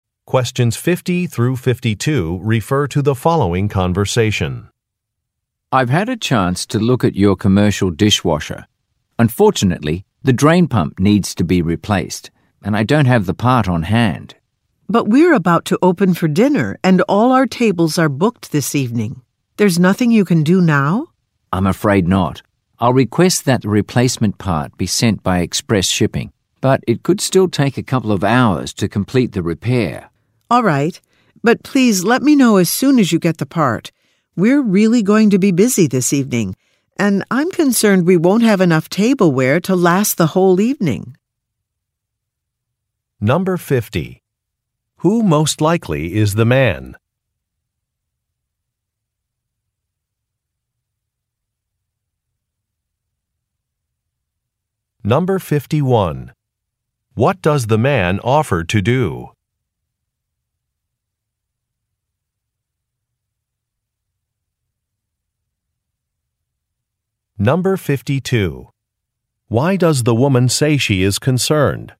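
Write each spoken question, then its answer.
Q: Who most likely is the man?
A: A repair technician (dishwasher repairer)

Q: What does the man offer to do?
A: Request that the replacement part be sent by express shipping

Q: Why does the woman say she is concerned?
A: They may not have enough tableware for the busy evening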